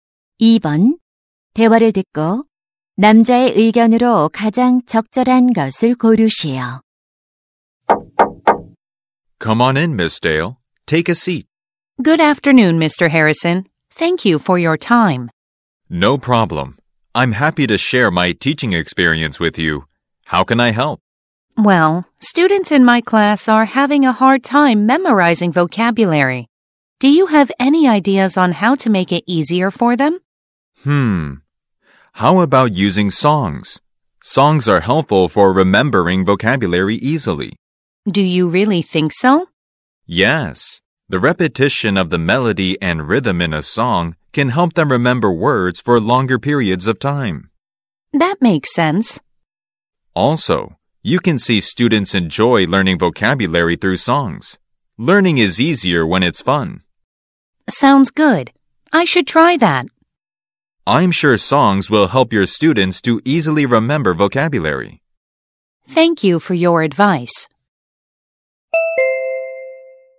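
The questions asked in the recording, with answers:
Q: 대화를 듣고 남자의 의견으로 가장 적절한 것을 고르시오.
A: 노래는 어휘를 쉽게 암기하는 데 도움이 된다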